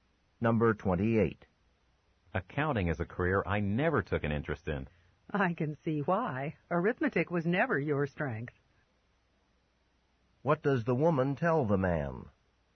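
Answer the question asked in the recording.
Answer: He was never good at arithmetic.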